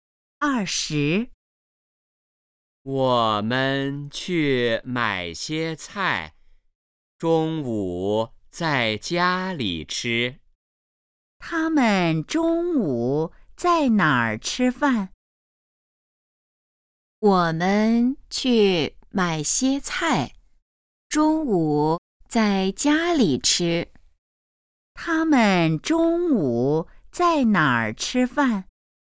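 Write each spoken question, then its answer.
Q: 他们中午在哪儿吃饭?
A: 在家里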